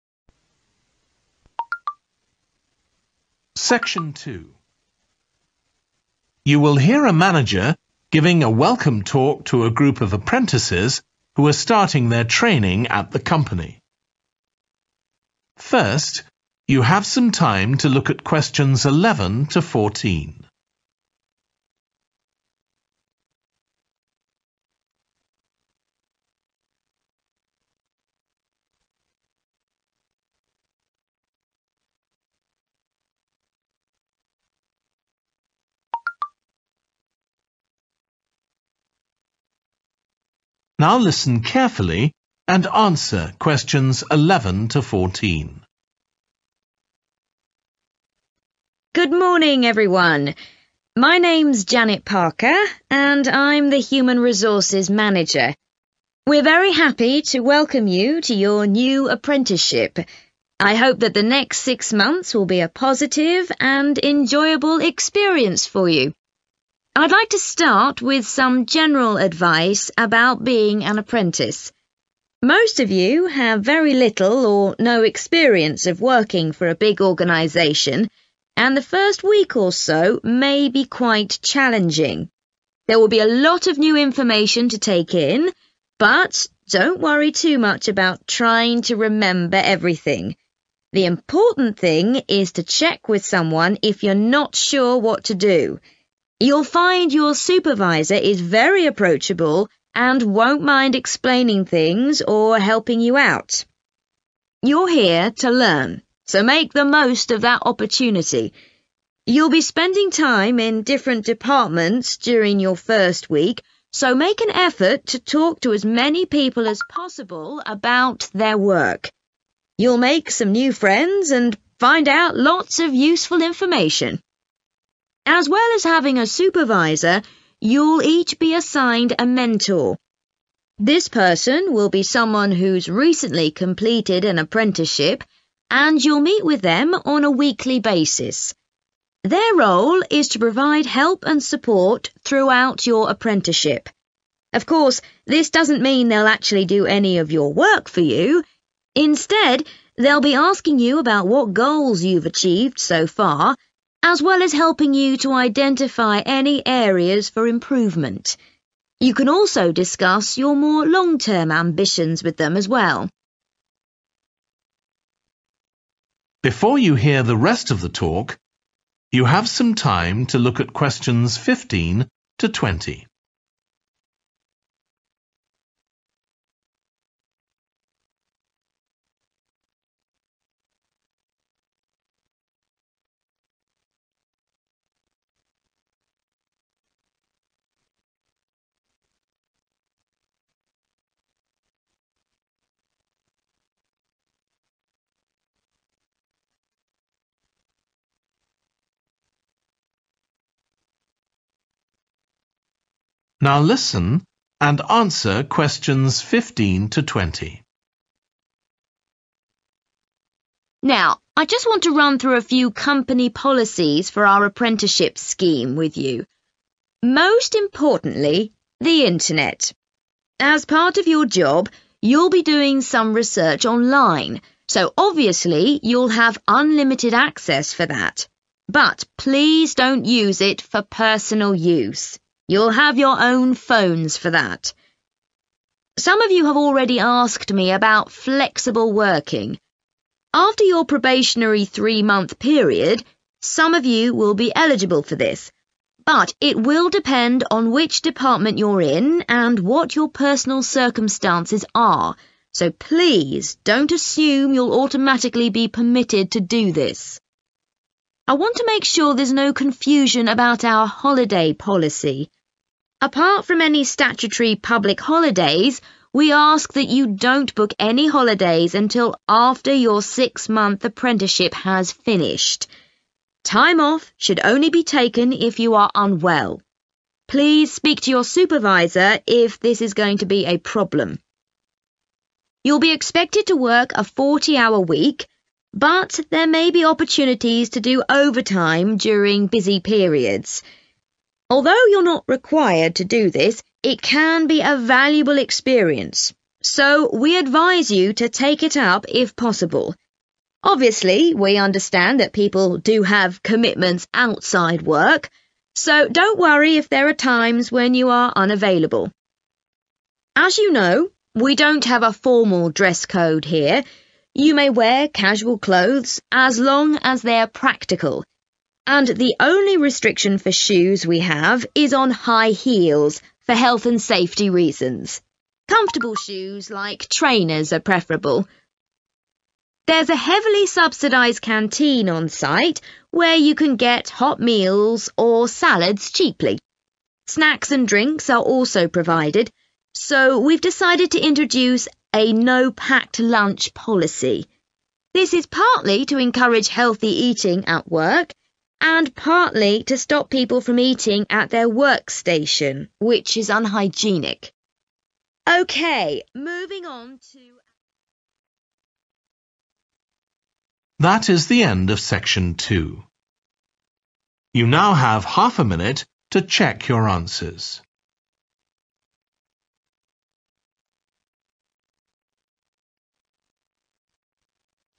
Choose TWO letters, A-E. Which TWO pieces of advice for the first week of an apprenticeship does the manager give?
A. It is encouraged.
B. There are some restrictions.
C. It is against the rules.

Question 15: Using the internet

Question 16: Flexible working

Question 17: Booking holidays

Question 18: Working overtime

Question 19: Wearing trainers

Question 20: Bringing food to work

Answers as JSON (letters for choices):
{"15": "B", "16": "B", "17": "C", "18": "A", "19": "A", "20": "C"}

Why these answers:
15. don't use it for personal use (Bạn sẽ thực hiện một số nghiên cứu trực tuyến cho công việc vì vậy bạn sẽ không bị giới hạn quyền truy cập, nhưng đừng sử dụng nó cho mục đích cá nhân)
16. it will depend on which department you're in and what your personal circumstances are (Sau thời gian ba tháng thử việc, một vài trong số các bạn sẽ đủ điều kiện – nhưng nó sẽ phụ thuộc vào việc bạn đang ở bộ phận nào và hoàn cảnh ra sao)
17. we ask that you don't book any holidays until after your six-month apprenticeship has finished (chúng tôi yêu cầu bạn không đặt bất kỳ ngày nghỉ nào cho đến khi quá trình học việc sáu tháng của bạn kết thúc)
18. it can be a valuable experience – so we advise you to take it up if possible. (có cơ hội để làm thêm giờ trong những giai đoạn bận rộn. Mặc dù bạn không yêu cầu phải làm thêm giờ, nhưng nó cũng là một trải nghiệm đáng giá đấy, bạn nên đảm nhận nếu có thể)